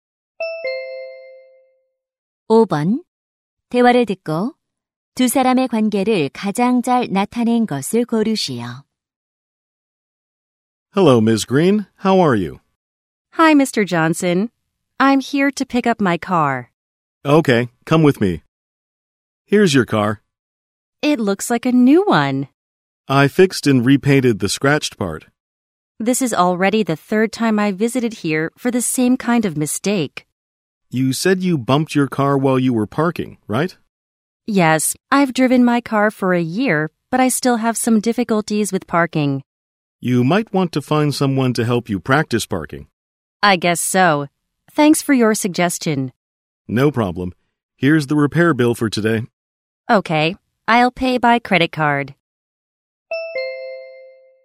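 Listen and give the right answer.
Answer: 자동차 정비사 - 고객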